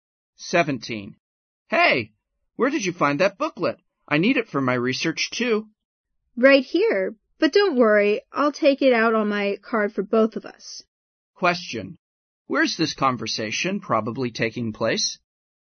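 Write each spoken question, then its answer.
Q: Where's this conversation probably taking place?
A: In a library.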